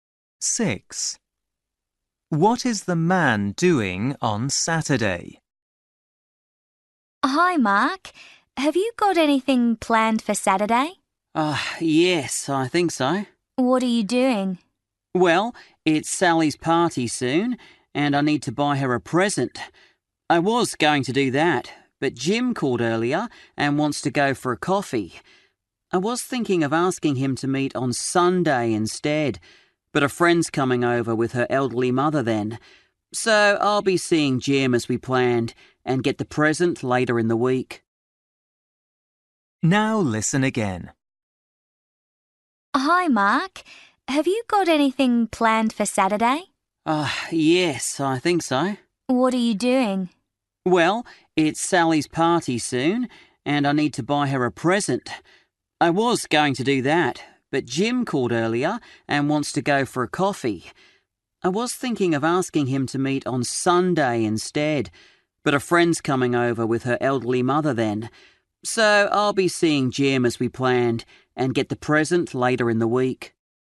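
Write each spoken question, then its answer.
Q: What is the man doing on Saturday?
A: meeting Jim for a coffee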